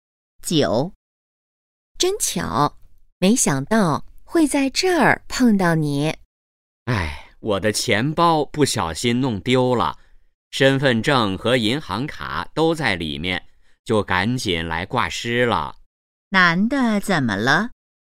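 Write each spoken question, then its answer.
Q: 男的怎么了?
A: 钱包丢了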